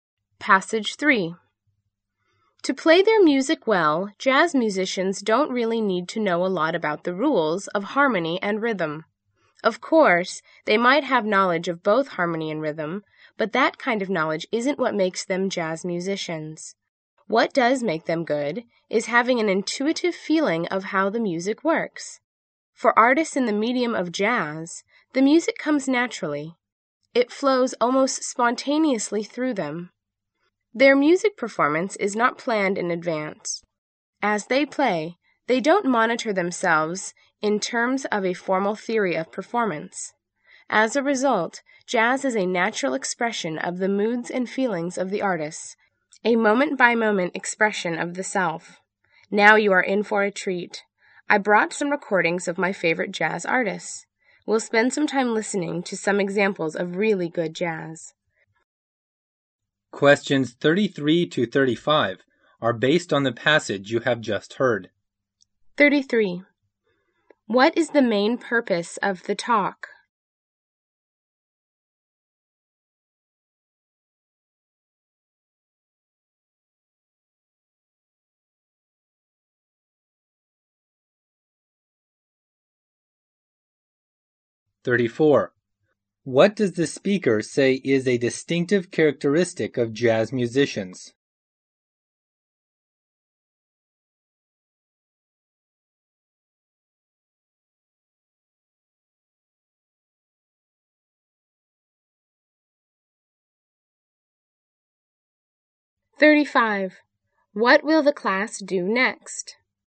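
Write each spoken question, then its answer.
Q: What is the main purpose of the talk?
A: To explain what makes jazz musicians good.

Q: What does the speaker say is a distinctive characteristic of jazz musicians?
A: An intuitive feeling for how the music works.

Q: What will the class do next?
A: Listen to jazz recordings.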